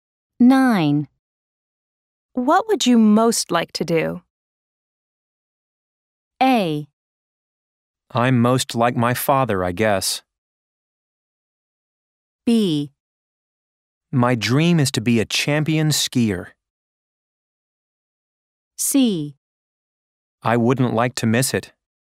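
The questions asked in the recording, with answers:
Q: What would you most like to do?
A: B: My dream is to be a champion skier.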